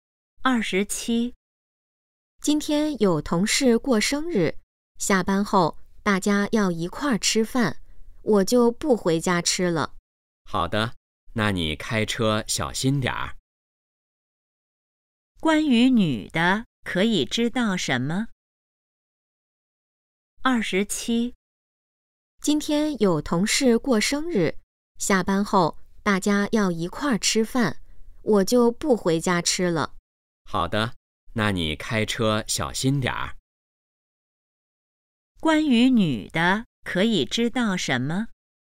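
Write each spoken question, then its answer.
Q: 关于女的可以知道什么?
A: 下班后要和同事一起吃饭,不回家吃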